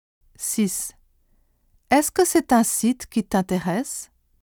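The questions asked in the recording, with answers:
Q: Est-ce que c'est un site qui t'intéresse?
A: qui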